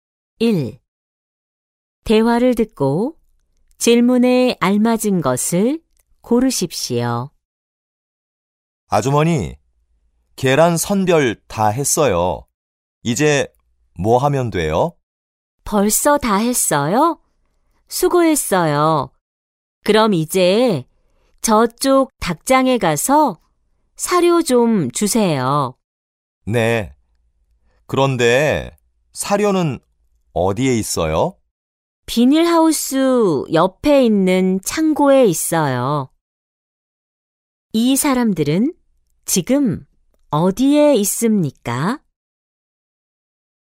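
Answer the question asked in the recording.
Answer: 농장(양계장)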